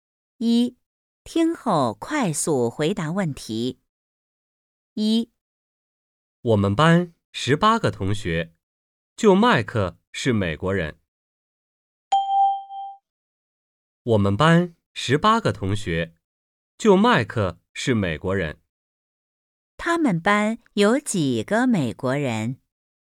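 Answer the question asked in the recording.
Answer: 一个(麦克)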